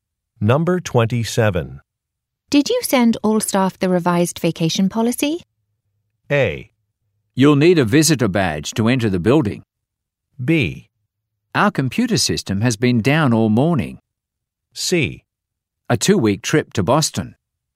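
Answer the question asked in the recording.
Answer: B: Our computer system has been down all morning.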